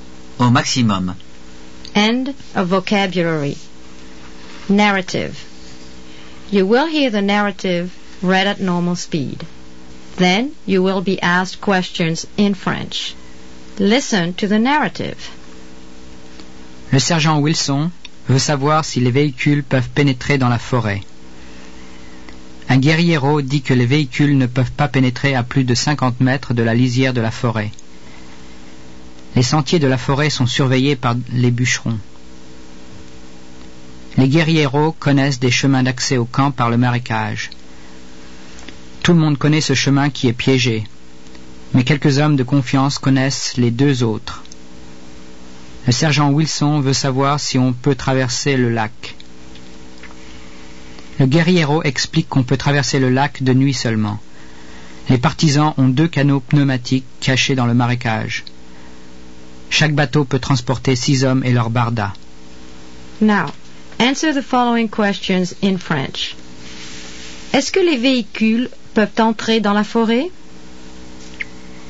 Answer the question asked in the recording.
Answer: Les véhicules peuvent pénétrer dans la forêt à une distance de 50 mètres de la lisière.